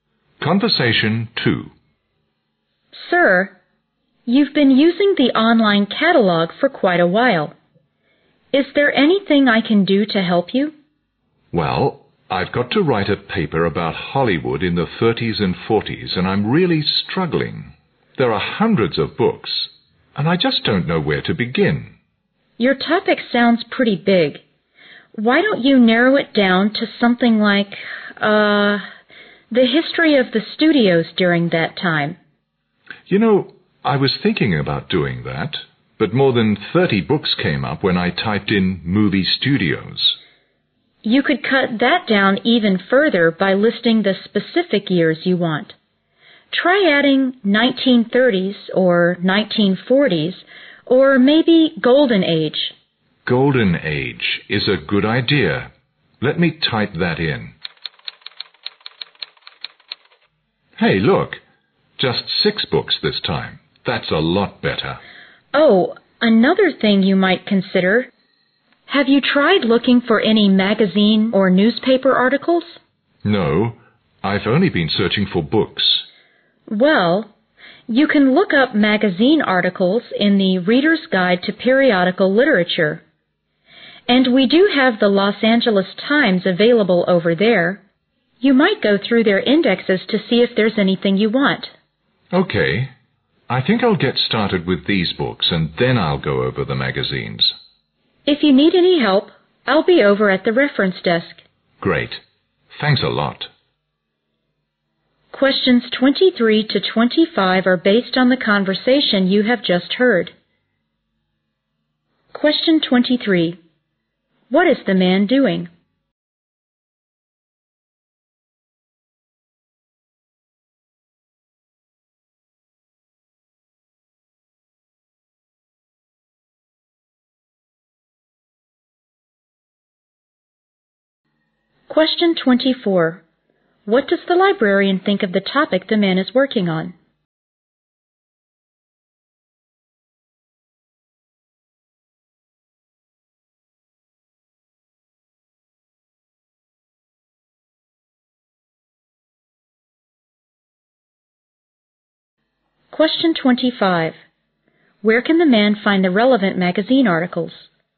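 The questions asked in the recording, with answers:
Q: What is the man doing?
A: Searching the library catalog for material for a paper on Hollywood in the 1930s and 1940s.

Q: What does the librarian think of the topic the man is working on?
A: It is too broad.

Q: Where can the man find the relevant magazine articles?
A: In the Reader's Guide to Periodical Literature.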